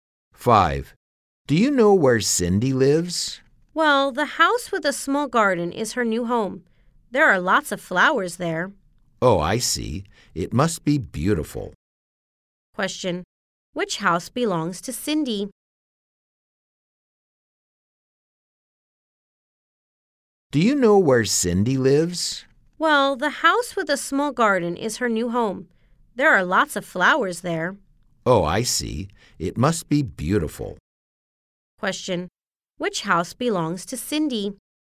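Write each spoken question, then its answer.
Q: Which house belongs to Cindy?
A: The house with a small garden with lots of flowers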